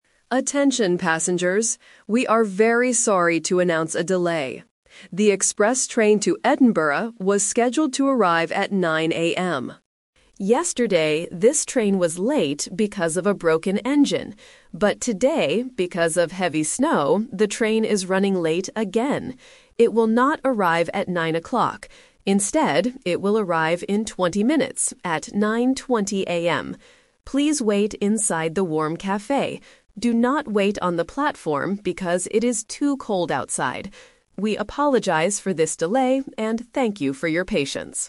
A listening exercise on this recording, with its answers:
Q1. Why is the train late TODAY?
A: Because of heavy snow.

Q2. What time will the train arrive?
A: At 9:20 AM.

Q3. Where should the passengers wait?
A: Inside the warm cafe.

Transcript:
Announcer: Attention passengers. We are very sorry to announce a delay. The express train to Edinburgh was scheduled to arrive at 9:00 AM. Yesterday, this train was late because of a broken engine. But today, because of heavy snow, the train is running late again. Instead, it will arrive in 20 minutes, at 9:20 AM. Please wait inside the warm cafe. Do not wait on the platform because it is too cold outside. We apologize for this delay and thank you for your patience.

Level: A2